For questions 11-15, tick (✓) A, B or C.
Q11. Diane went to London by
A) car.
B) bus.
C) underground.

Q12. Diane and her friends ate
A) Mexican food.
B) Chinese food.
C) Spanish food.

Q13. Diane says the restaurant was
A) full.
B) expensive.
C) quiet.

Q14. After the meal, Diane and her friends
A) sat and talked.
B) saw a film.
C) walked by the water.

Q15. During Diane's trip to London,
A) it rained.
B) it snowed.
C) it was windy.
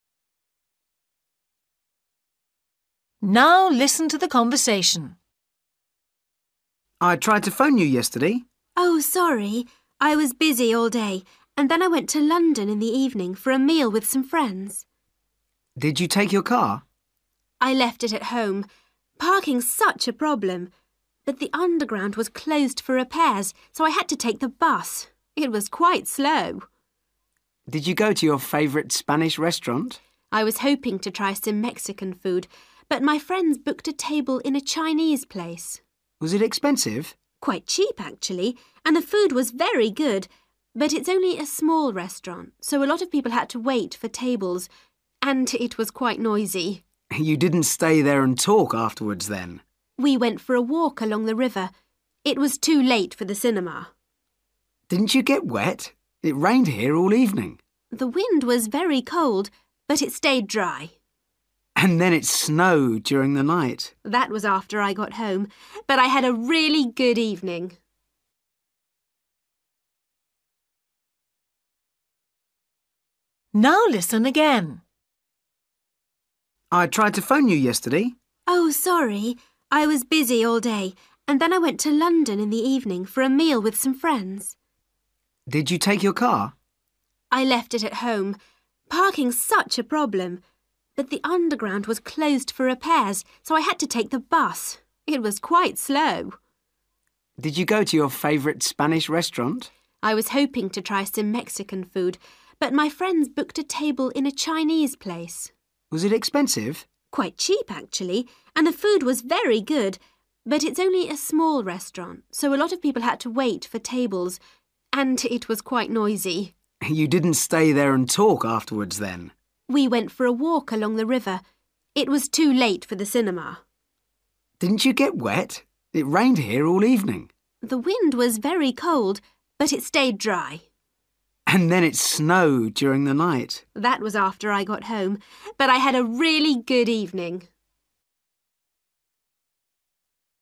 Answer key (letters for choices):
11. B
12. B
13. A
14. C
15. C

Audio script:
Friend: I tried to phone you yesterday.
Diane: Oh, sorry. I was busy all day and then I went to London in the evening for a meal with some friends.
Friend: Did you take your car?
Diane: I left it at home. Parking's such a problem. But the underground was closed for repairs so I had to take the bus. It was quite slow.
Friend: Did you go to your favourite Spanish restaurant?
Diane: I was hoping to try some Mexican food but my friends booked a table in a Chinese place.
Friend: Was it expensive?
Diane: Quite cheap actually, and the food was very good – but it's only a small restaurant so a lot of people had to wait for tables – and it was quite noisy.
Friend: You didn't stay there and talk afterwards then!
Diane: We went for a walk along the river. It was too late for the cinema.
Friend: Didn't you get wet? It rained here all evening.
Diane: The wind was very cold but it stayed dry.
Friend: And then it snowed during the night!
Diane: That was after I got home. But I had a really good evening!

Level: A2